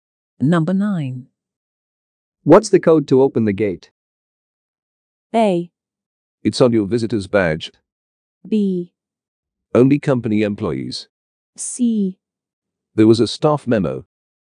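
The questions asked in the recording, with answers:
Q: What's the code to open the gate?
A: A: It's on your visitor's badge.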